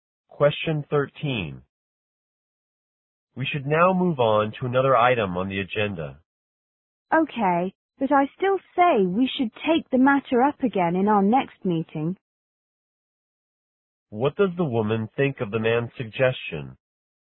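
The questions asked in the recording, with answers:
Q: What does the woman think of the man's suggestion?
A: She agrees to move on, but she thinks the matter should be discussed again at the next meeting.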